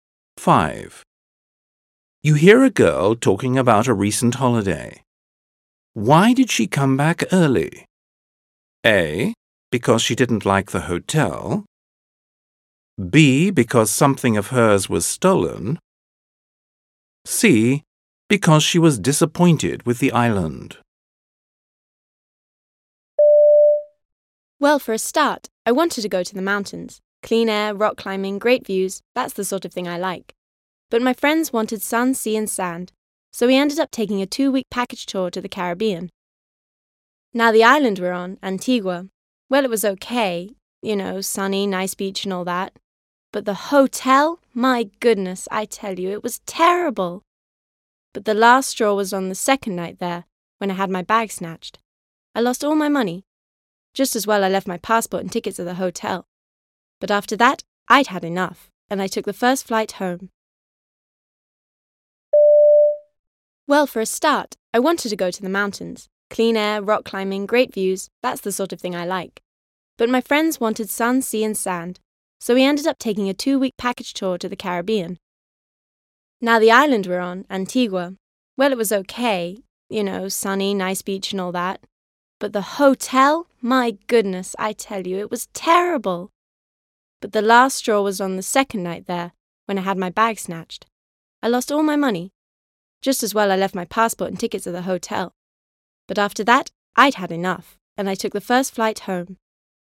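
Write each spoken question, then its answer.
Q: Why did she come back early?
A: B: Because something of hers was stolen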